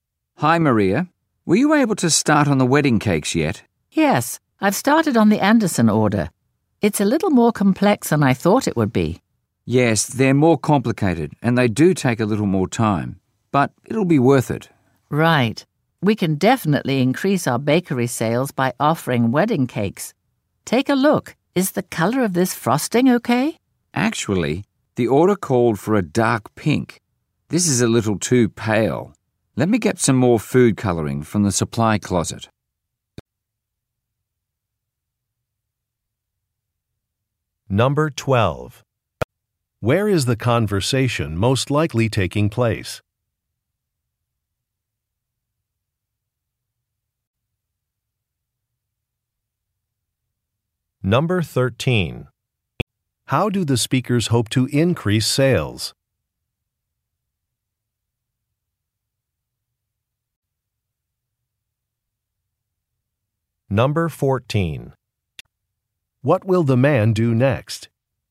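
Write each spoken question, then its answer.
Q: Where is the conversation most likely taking place?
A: At a bakery

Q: How do the speakers hope to increase sales?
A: By offering wedding cakes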